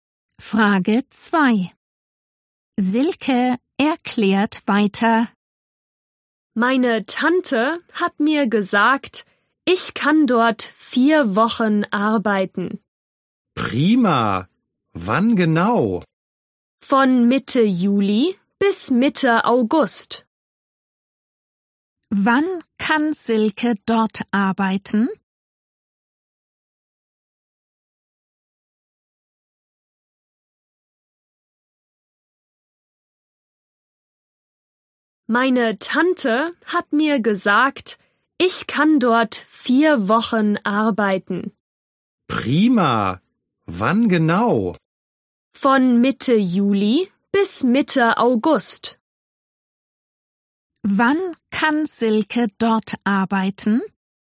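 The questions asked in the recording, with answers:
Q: Wann kann Silke dort arbeiten?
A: Von Mitte Juli bis Mitte August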